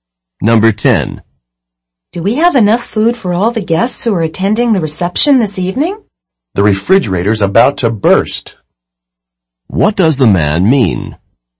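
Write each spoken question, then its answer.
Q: What does the man mean?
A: There is plenty of food.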